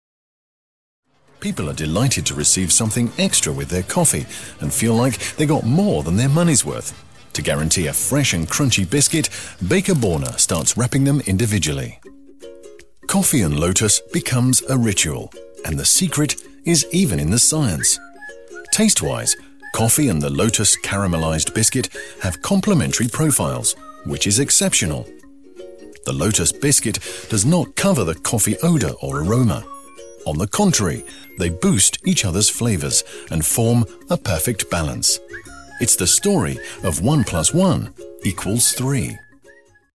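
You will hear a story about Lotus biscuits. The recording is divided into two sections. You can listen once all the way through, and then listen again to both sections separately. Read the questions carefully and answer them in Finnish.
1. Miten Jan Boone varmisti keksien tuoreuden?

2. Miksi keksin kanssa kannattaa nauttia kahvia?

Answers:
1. Hän alkoi pakata keksit yksittäin.
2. Makuprofiilit täydentävät toisiaan: keksi ei peitä kahvin aromia vaan ne vahvistavat toistensa makuja.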